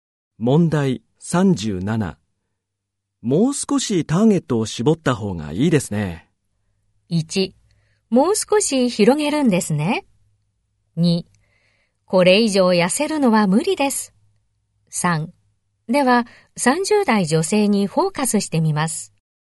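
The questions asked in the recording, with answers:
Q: もう少しターゲットを絞った方がいいですね。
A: 3: では、30代女性にフォーカスしてみます。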